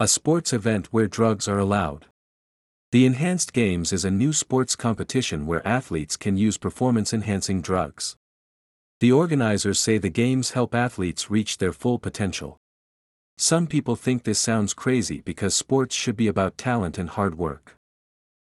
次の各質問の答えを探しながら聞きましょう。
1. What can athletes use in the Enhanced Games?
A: They can use performance-enhancing drugs.

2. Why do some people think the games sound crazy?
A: Because they think sports should be about talent and hard work, not drugs.

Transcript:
A Sports Event Where Drugs Are Allowed?
The Enhanced Games is a new sports competition where athletes can use performance-enhancing drugs.
The organizers say the games help athletes reach their full potential.
Some people think this sounds crazy because sports should be about talent and hard work.

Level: 中級脱出のリスニング特訓